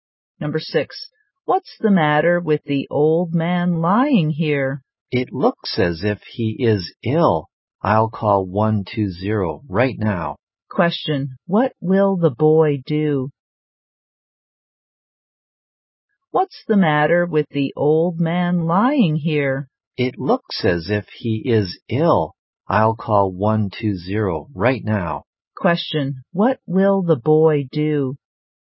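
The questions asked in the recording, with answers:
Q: Question, what will the boy do?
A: Call 120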